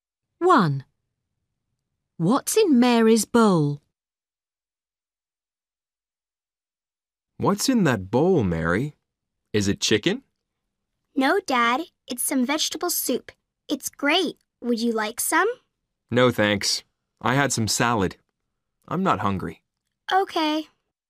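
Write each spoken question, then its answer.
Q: What's in Mary's bowl?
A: vegetable soup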